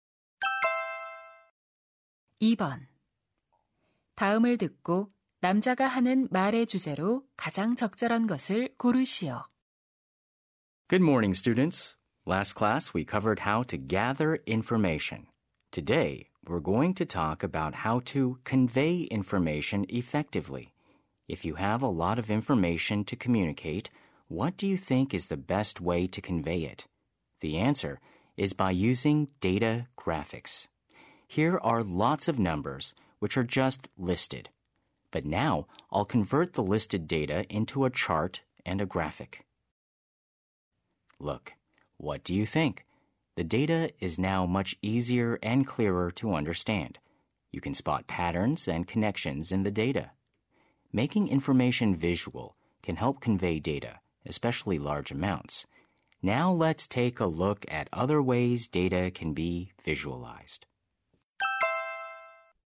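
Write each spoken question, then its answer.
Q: 다음을 듣고 남자가 하는 말의 주제로 가장 적절한 것을 고르시오.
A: 데이터 시각화를 통한 효과적인 정보 전달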